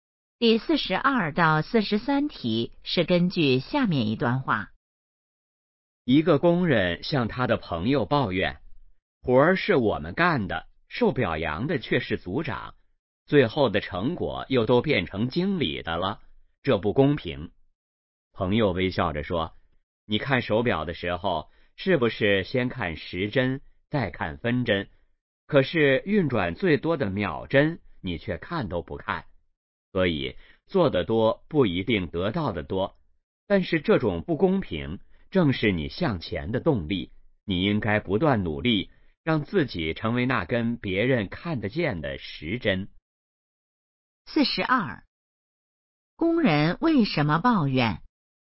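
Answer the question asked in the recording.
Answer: 活儿是他们干的,表扬和成果却归组长和经理,觉得不公平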